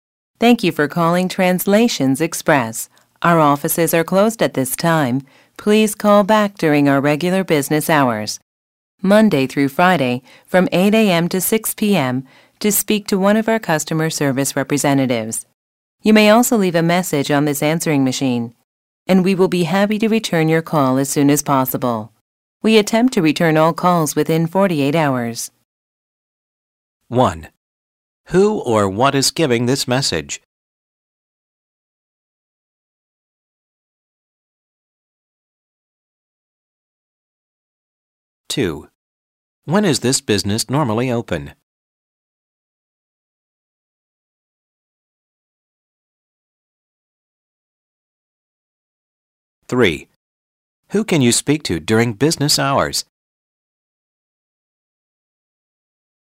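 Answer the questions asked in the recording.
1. An answering machine at Translations Express
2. Monday to Friday, 8 a.m. to 6 p.m.
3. A customer service representative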